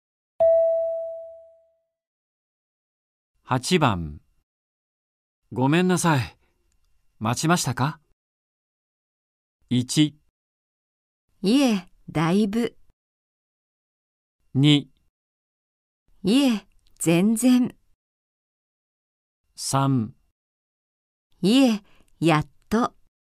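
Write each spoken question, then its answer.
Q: ごめんなさい。待ちましたか?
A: 2: いえ、全然。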